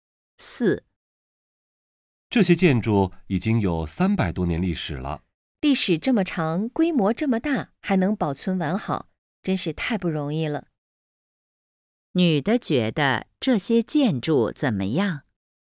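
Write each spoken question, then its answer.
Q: 女的觉得这些建筑怎么样?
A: 保存完好,很不容易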